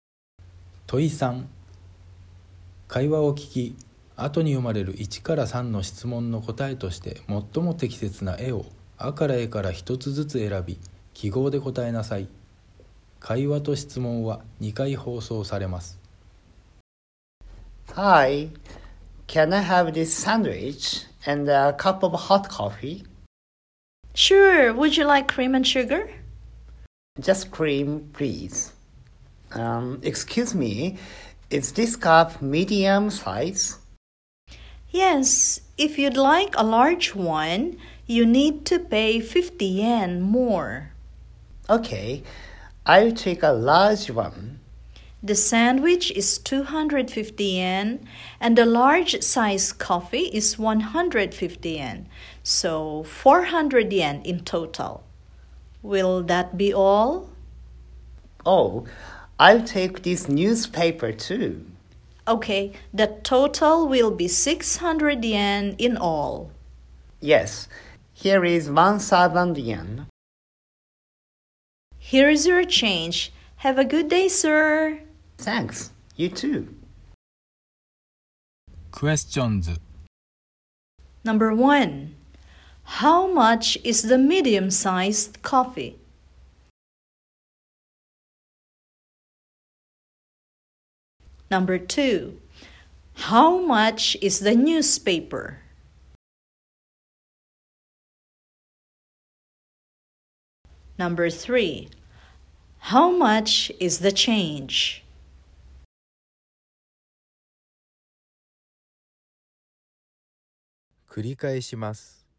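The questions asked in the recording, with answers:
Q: how much is the medium-sized coffee?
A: 100 yen

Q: how much is the newspaper?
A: 200 yen

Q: how much is the change?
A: 400 yen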